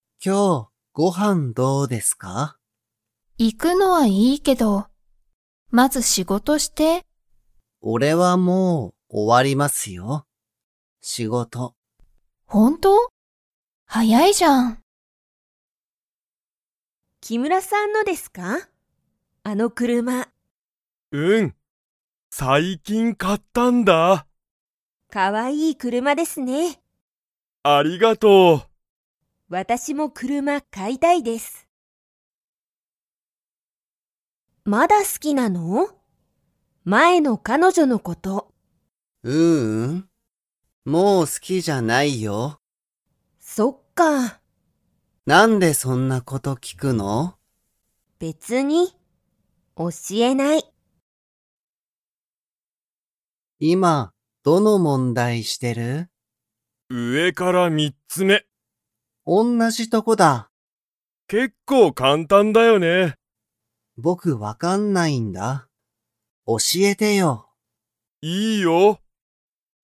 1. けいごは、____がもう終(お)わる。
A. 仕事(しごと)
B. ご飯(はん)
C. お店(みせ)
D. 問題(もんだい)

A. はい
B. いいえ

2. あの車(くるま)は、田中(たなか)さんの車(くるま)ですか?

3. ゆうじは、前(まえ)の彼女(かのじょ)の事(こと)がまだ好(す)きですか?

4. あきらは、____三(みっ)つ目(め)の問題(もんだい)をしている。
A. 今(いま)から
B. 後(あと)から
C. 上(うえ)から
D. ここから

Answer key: 1A, 2B, 3B, 4C

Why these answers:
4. あきら:上(うえ)から三(みっ)つ目(め)。

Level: Level 1

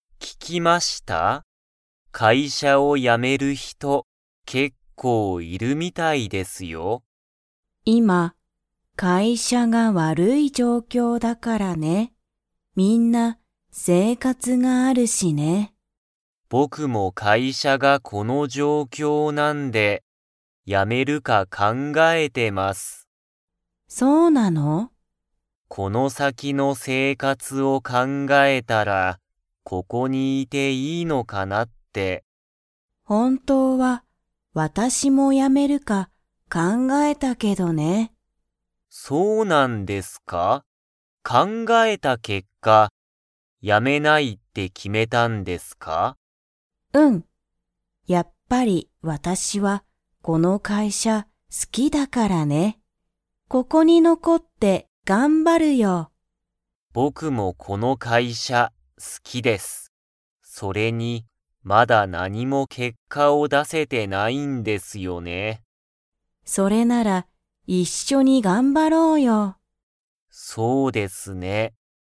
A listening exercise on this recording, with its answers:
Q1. 鈴木(すずき)さんは、この____が好(す)きだ。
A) 会社(かいしゃ)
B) 勉強(べんきょう)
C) 家(いえ)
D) 本(ほん)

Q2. 伊藤(いとう)さんは、会社(かいしゃ)を辞(や)めますか?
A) はい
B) いいえ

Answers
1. A
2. B

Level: Level 2

